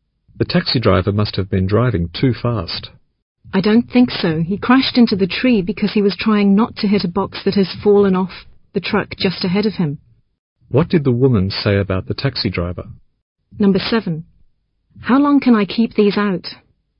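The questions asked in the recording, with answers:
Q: What did the woman say about the taxi driver?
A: He wasn't speeding; he crashed while avoiding a box that fell off a truck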